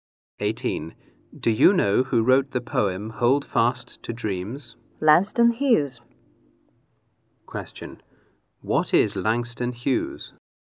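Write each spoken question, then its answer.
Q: What is Langston Hughes?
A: A poet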